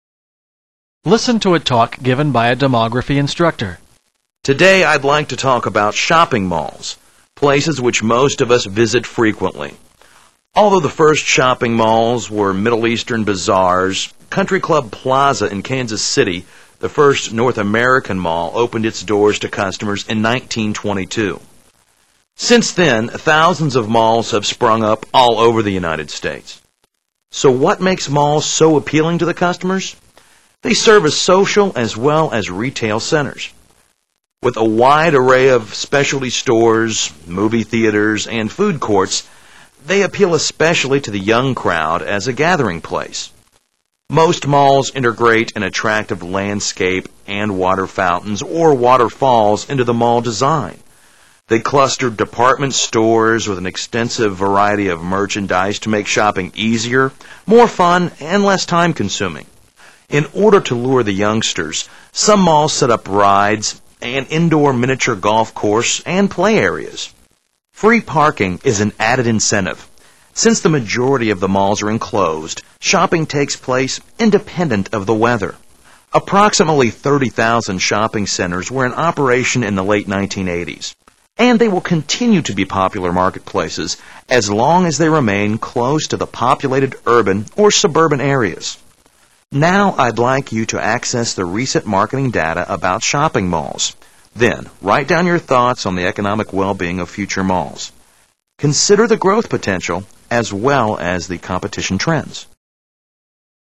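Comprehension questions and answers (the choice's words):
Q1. According to the speaker, why do shopping malls appeal to young people?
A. They promote a carefree lifestyle.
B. They have security guards on duty all the time.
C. They display the latest fashion styles.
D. They offer shopping as well as many other attractions.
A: They offer shopping as well as many other attractions.

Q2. What contributes to the popularity of the mall as a marketplace?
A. Proximity to populous areas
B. Stage performances during holiday seasons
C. Reliable maintenance management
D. Store owners' creative promotions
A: Proximity to populous areas

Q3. According to the passage, what are the students expected to do?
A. Propose a petition for more free parking spaces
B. Review the shopping trends during the 1980's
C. State their ideas about the prosperity of malls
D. Evaluate the national competition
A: State their ideas about the prosperity of malls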